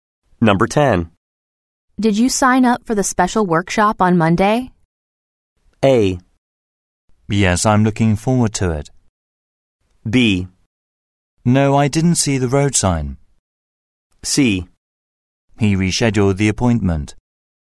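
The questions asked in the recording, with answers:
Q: Did you sign up for the special workshop on Monday?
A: A: Yes, I'm looking forward to it.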